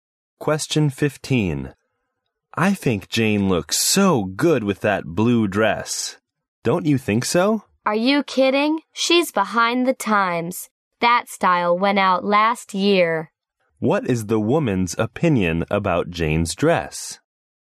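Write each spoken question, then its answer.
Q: What is the woman's opinion about Jane's dress?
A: It is out of fashion.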